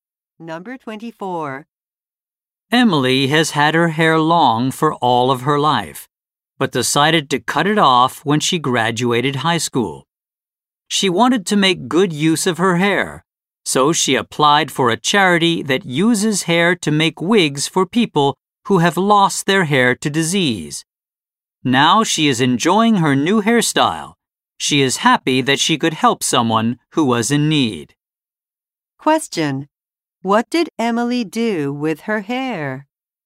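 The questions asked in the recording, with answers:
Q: What did Emily do with her hair?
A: She gave it to a charity that makes wigs.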